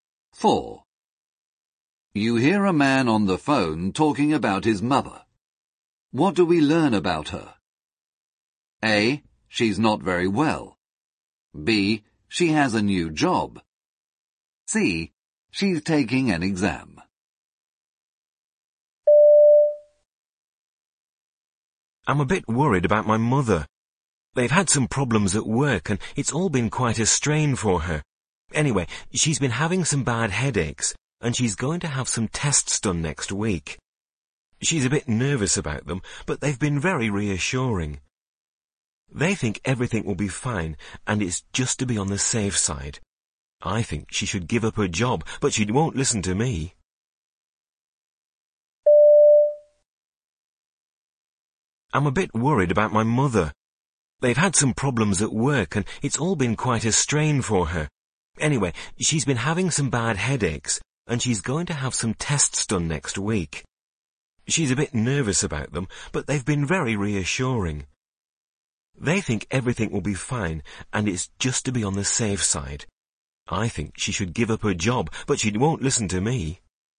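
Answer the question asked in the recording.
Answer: A: She's not very well.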